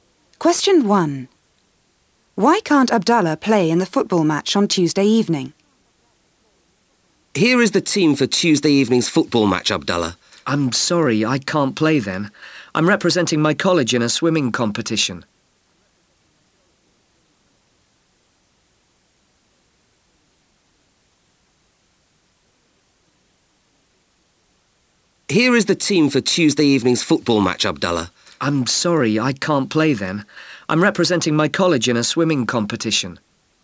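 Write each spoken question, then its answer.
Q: Why can't Abdallah play in the football match on Tuesday evening?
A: He's representing his college in a swimming competition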